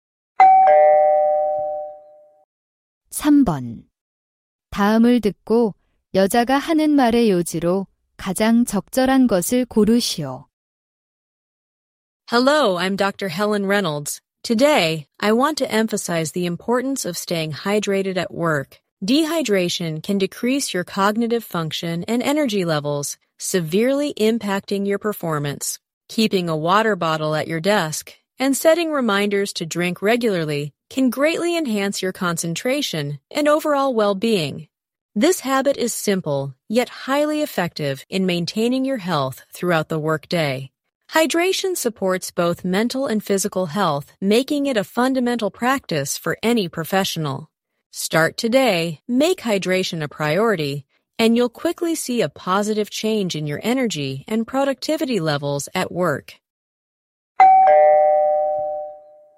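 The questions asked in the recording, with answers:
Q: 다음을 듣고 여자가 하는 말의 요지로 가장 적절한 것을 고르시오.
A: 직장에서 수분을 충분히 섭취하는 것이 중요하다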